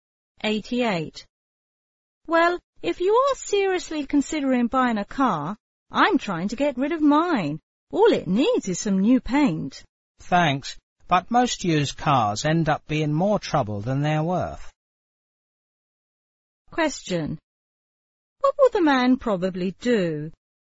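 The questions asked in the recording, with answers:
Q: What will the man probably do?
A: Not buy the woman's car.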